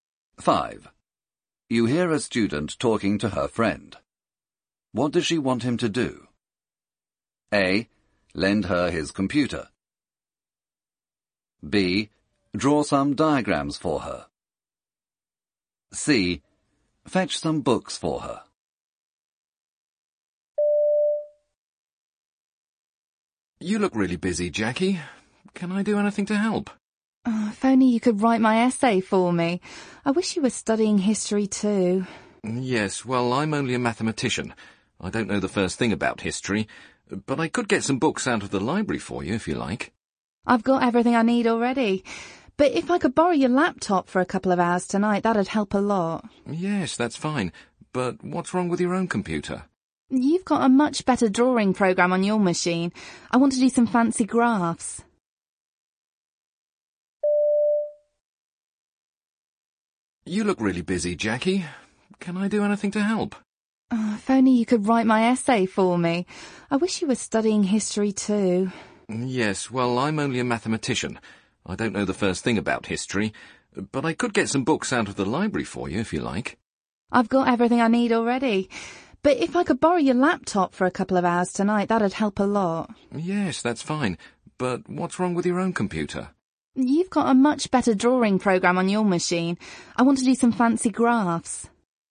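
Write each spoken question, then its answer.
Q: What does she want him to do?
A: A: Lend her his computer.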